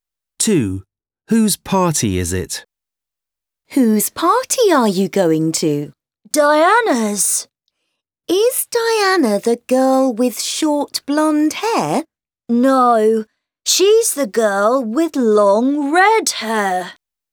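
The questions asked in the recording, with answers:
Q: Whose party is it?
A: Diana's, the girl with long red hair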